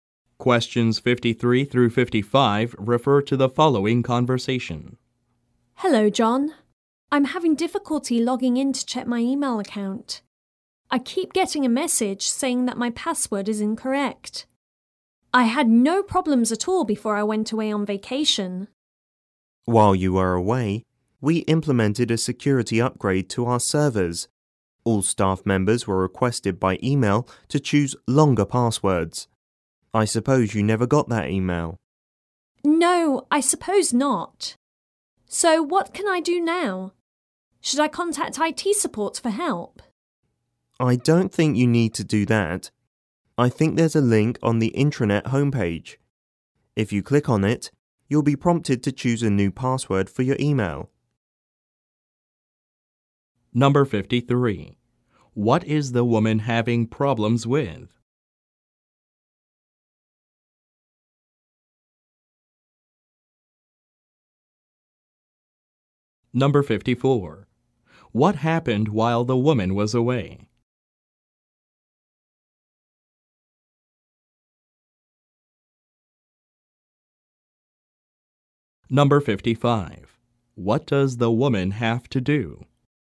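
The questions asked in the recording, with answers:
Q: What is the woman having problems with?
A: Logging in to her email account

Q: What happened while the woman was away?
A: A security upgrade was made to the servers

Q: What does the woman have to do?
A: Choose a new, longer password using the link on the intranet homepage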